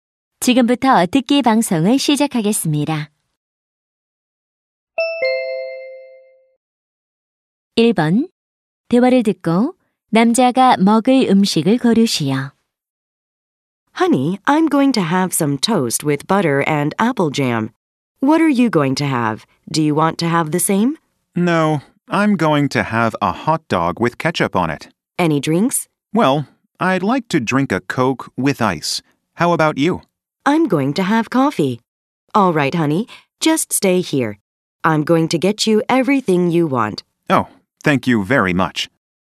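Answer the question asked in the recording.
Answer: 케첩을 뿌린 핫도그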